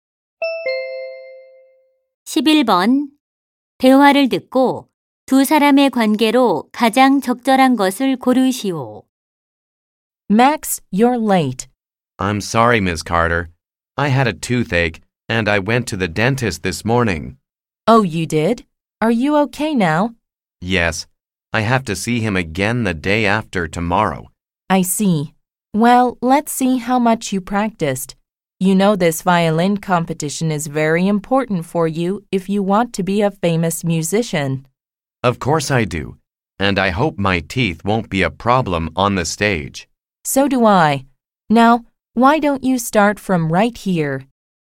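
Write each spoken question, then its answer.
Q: 대화를 듣고 두 사람의 관계로 가장 적절한 것을 고르시오.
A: 바이올린 선생님과 학생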